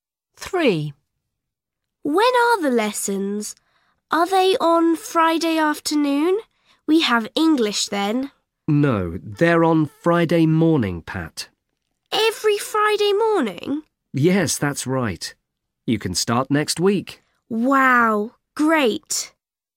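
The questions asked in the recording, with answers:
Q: When are the lessons?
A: Friday morning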